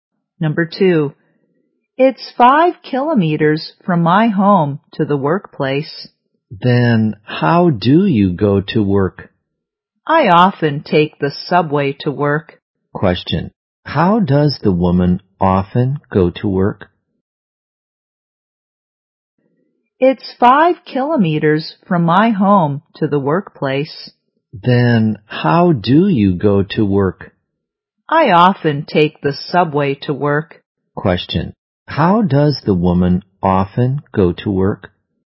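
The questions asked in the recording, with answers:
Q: how does the woman often go to work?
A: By subway.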